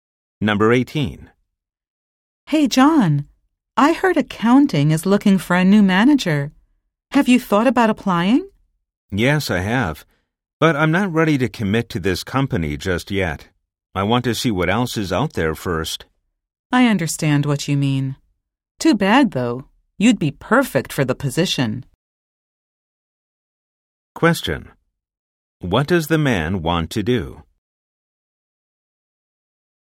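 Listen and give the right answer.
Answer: Look at job opportunities outside the company first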